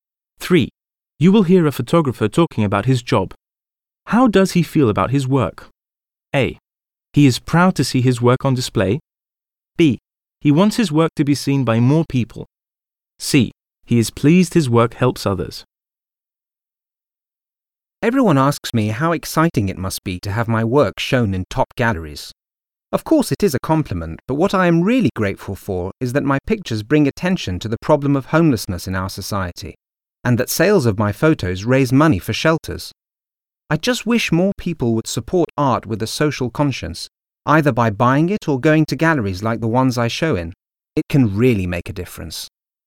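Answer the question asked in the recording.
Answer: C: He is pleased his work helps others.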